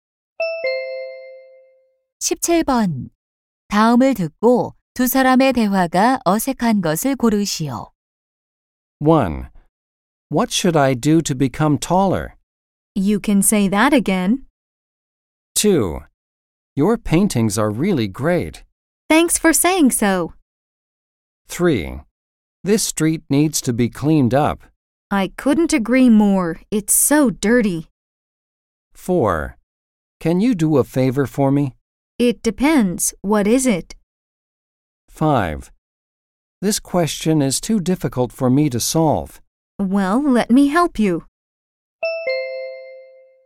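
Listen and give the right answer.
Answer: 1: What should I do to become taller? / You can say that again.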